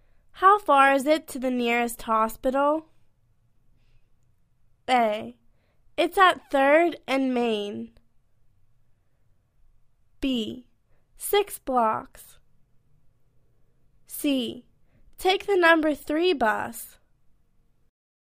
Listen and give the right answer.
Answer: Six blocks